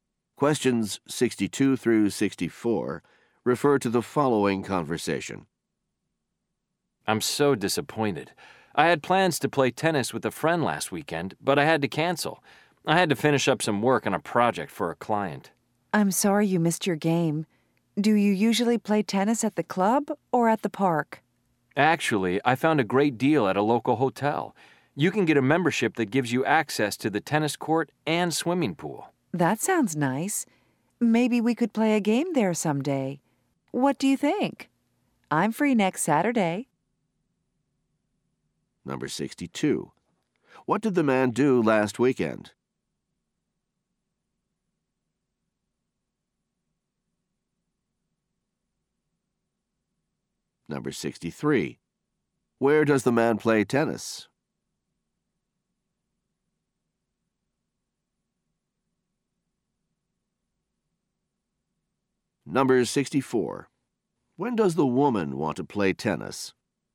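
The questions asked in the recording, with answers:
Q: What did the man do last weekend?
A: Worked on a project for a client

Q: Where does the man play tennis?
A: At a local hotel

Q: When does the woman want to play tennis?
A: Next Saturday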